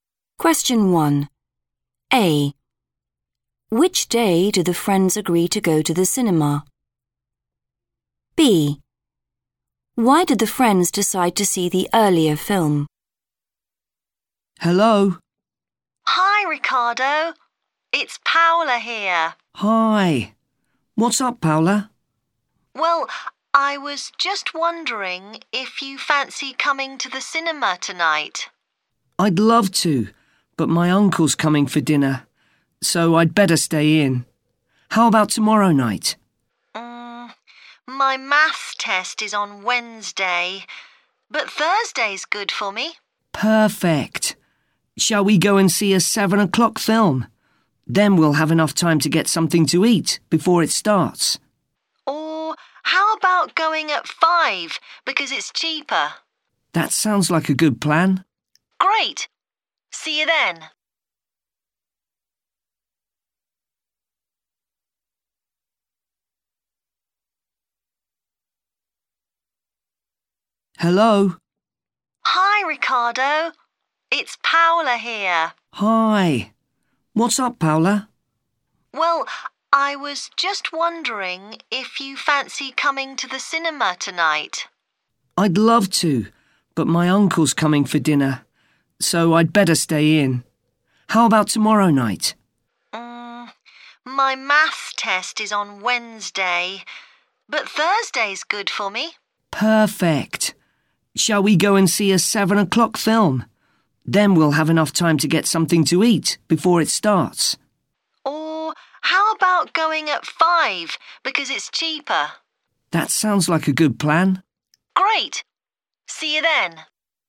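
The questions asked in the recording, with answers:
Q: Which day do the friends agree to go to the cinema?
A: Thursday

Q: Why did the friends decide to see the earlier film?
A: It's cheaper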